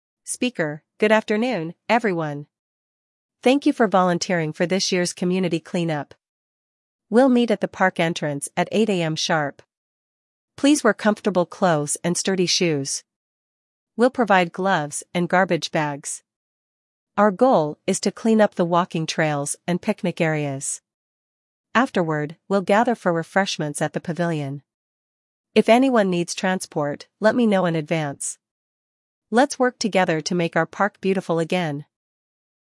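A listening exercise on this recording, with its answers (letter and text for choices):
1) Where will the volunteers meet?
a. At the parking lot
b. At the pavilion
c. At the park entrance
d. At the playground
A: c. At the park entrance

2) What time should volunteers arrive?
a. 7:30 AM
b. 8:00 AM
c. 9:00 AM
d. 10:00 AM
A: b. 8:00 AM

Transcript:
Thank you for volunteering for this year's community clean-up. We'll meet at the park entrance at 8:00 AM sharp. Please wear comfortable clothes and sturdy shoes. We'll provide gloves and garbage bags. Our goal is to clean up the walking trails and picnic areas. Afterward, we'll gather for refreshments at the pavilion. If anyone needs transport, let me know in advance. Let's work together to make our park beautiful again!" Questions: 5.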